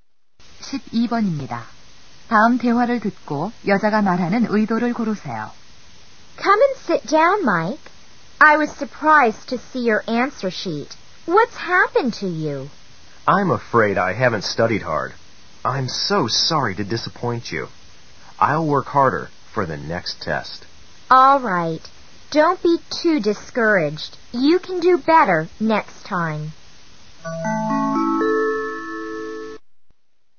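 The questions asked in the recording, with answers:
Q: 다음 대화를 듣고 여자가 말하는 의도를 고르세요.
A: 격려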